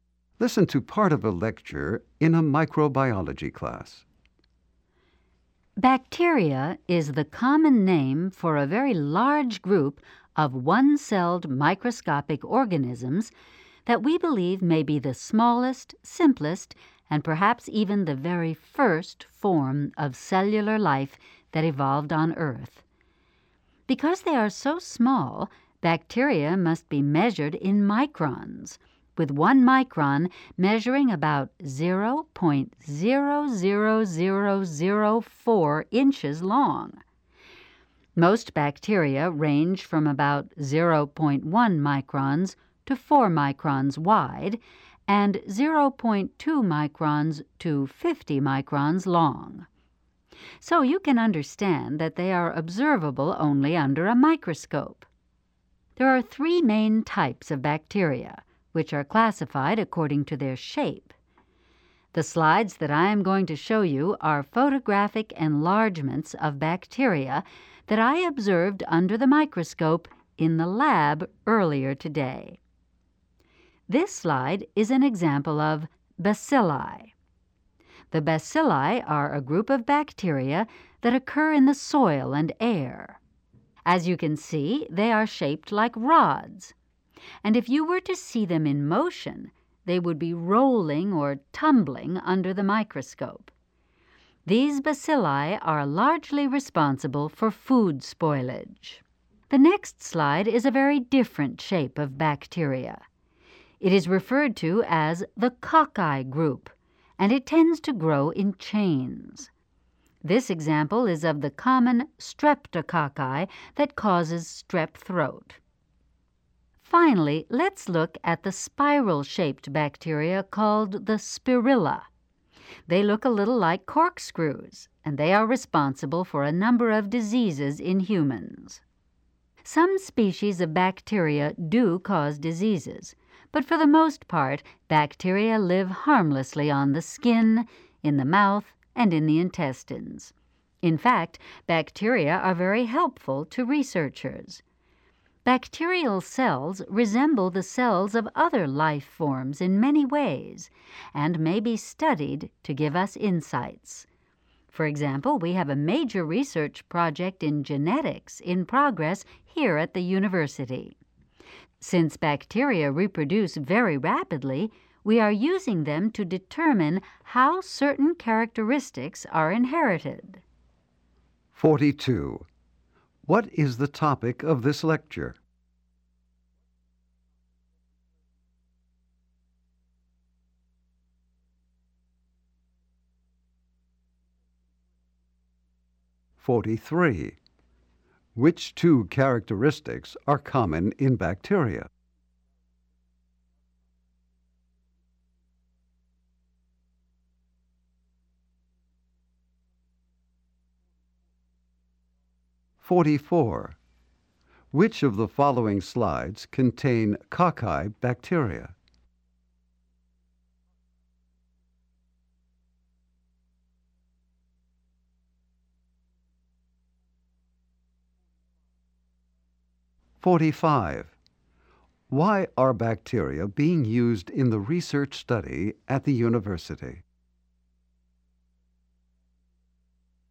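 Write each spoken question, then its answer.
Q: What is the topic of this lecture?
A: Bacteria.

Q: Why are bacteria being used in the research study at the university?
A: They reproduce very rapidly, so they help show how characteristics are inherited.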